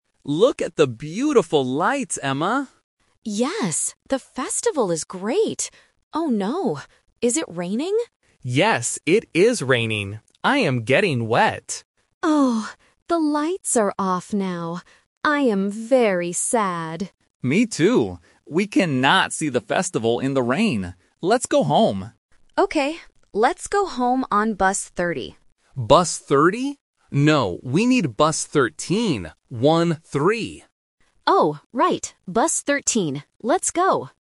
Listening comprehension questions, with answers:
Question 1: What is the weather like?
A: It is raining.

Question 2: How does Emma feel now?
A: She is very sad.

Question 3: How will they go home?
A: On Bus 13

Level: A1